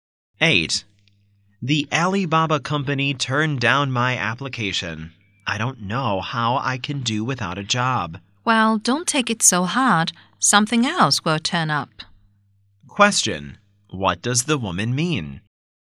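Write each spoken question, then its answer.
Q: What does the woman mean?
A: The man will find another job.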